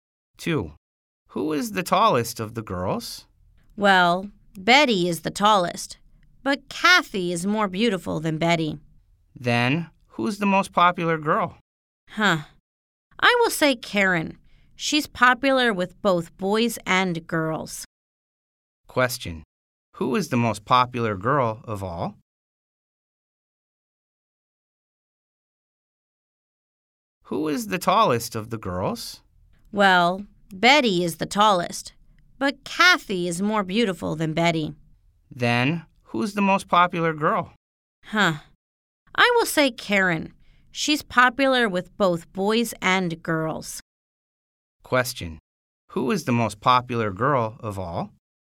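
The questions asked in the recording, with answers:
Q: Question. Who is the most popular girl of all?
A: Karen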